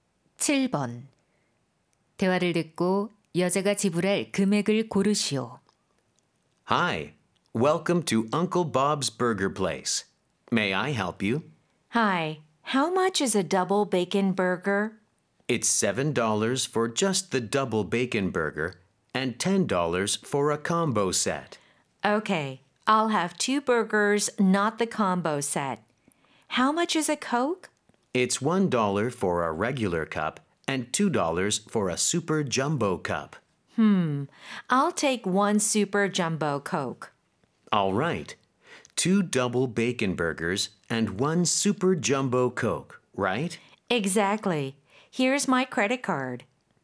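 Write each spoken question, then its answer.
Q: 대화를 듣고 여자가 지불할 금액을 고르시오.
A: $16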